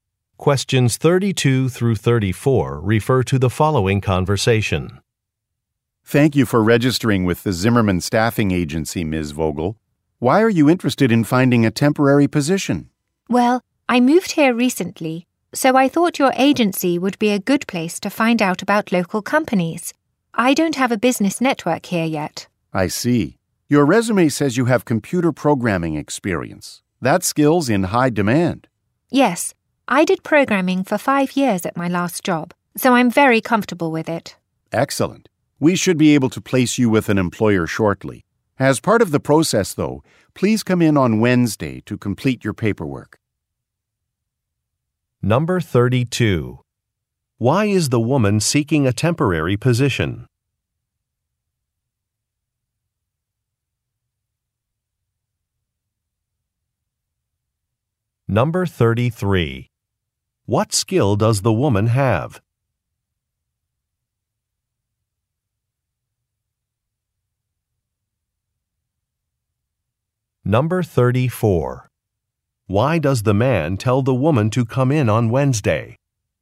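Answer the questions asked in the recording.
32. She moved recently and wants to learn about local companies
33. Computer programming
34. To complete her paperwork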